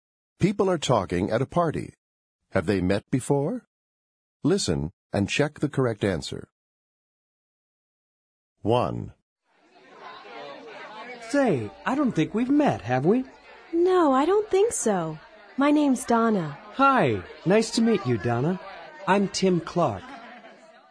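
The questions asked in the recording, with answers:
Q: Have they met before?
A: No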